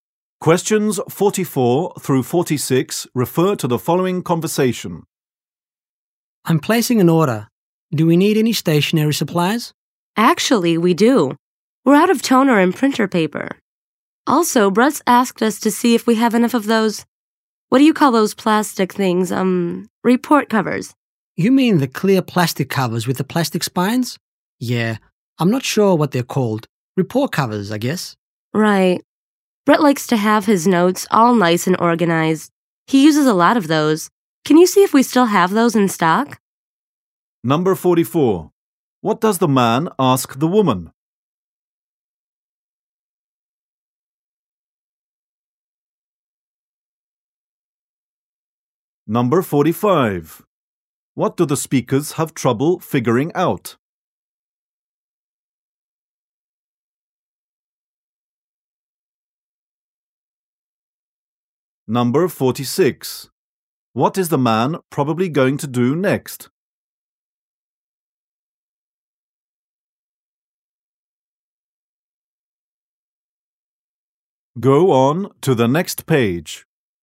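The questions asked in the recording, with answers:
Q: What does the man ask the woman?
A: Whether they need any stationery supplies

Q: What do the speakers have trouble figuring out?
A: What the plastic report covers are called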